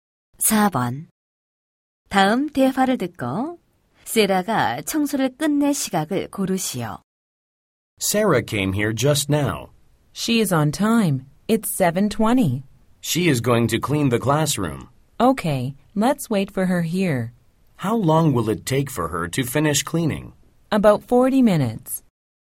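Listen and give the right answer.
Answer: 8시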